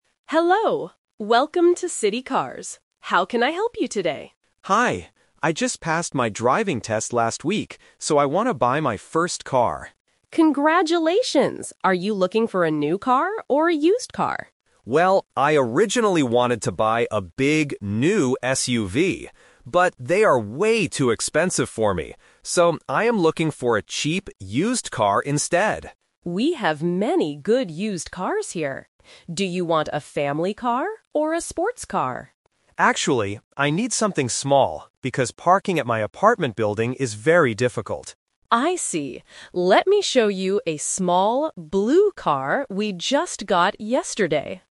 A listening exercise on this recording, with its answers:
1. Why is the customer at the car shop?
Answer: To buy his first car.

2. What kind of car does the customer want to buy now?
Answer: A cheap, used car.

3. Why does the customer want a small car?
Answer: Because parking is difficult at his apartment.

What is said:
Dealer: Hello, welcome to City Cars. How can I help you today?
Customer: Hi. I just passed my driving test last week, so I want to buy my first car.
Dealer: Congratulations! Are you looking for a new car or a used car?
Customer: Well, I originally wanted to buy a big, new SUV. But, they are way too expensive for me. So, I am looking for a cheap, used car instead.
Dealer: We have many good used cars here. Do you want a family car or a sports car?
Customer: Actually, I need something small because parking at my apartment building is very difficult.
Dealer: I see. Let me show you a small, blue car we just got yesterday.